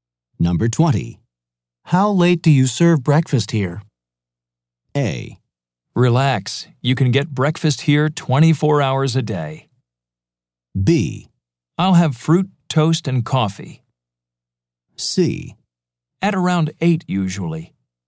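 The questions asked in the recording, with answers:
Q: How late do you serve breakfast here?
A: A: Relax. You can get breakfast here 24 hours a day.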